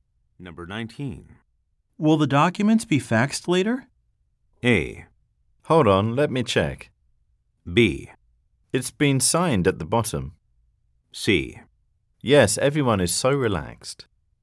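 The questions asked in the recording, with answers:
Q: Will the documents be faxed later?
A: A: Hold on, let me check.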